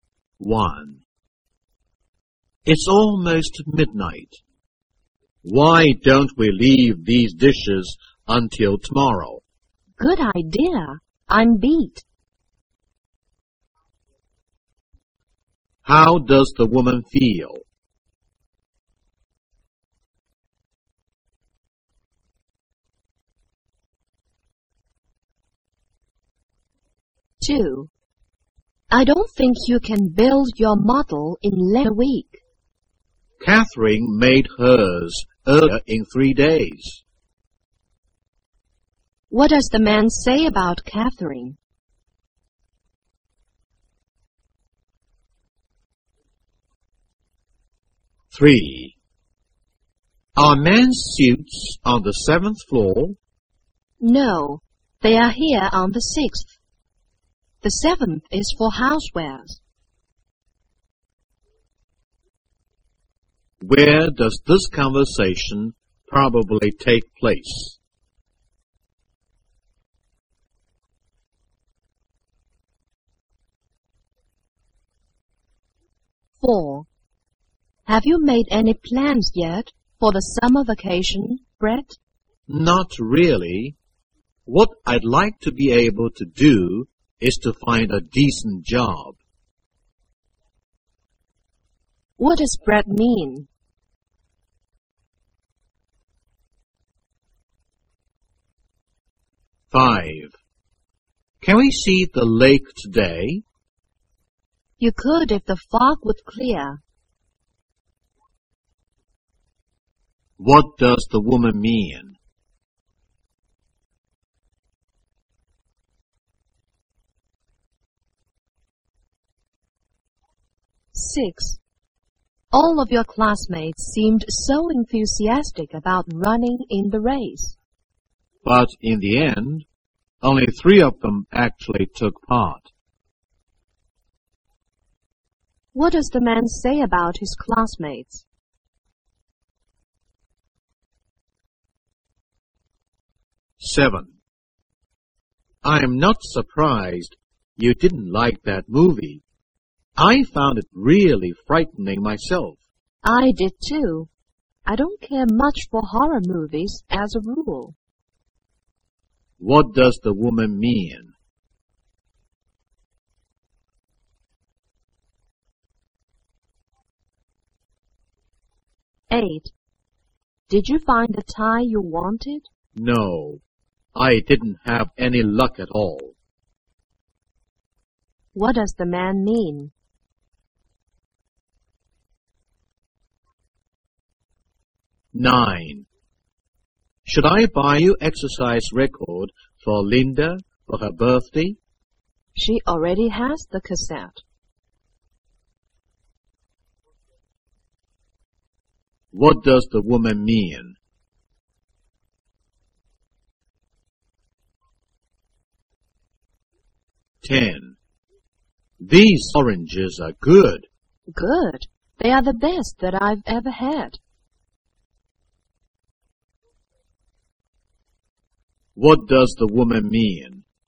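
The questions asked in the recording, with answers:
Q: How does the woman feel?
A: Very tired

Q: What does the man say about Catherine?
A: She made her model in only 3 days

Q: Where does this conversation probably take place?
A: In a department store

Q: What does Brett mean?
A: He hopes to find a decent summer job

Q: What does the woman mean?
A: The fog makes it impossible to see the lake now

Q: What does the man say about his classmates?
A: Only 3 of them actually ran in the race

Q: What does the woman mean?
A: She didn't like the movie either; she dislikes horror movies

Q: What does the man mean?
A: He didn't find the tie

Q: What does the woman mean?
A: Linda already has that recording, so don't buy it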